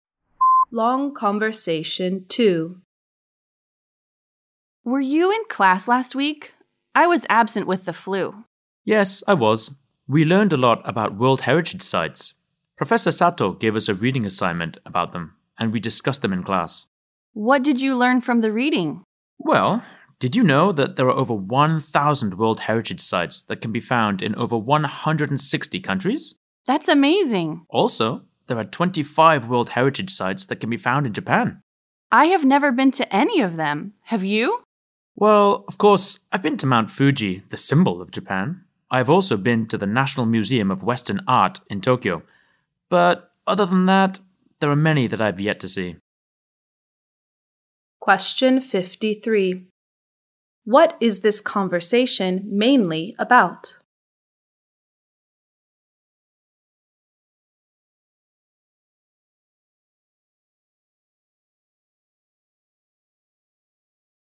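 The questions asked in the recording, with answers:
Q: What is this conversation mainly about?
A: World Heritage Sites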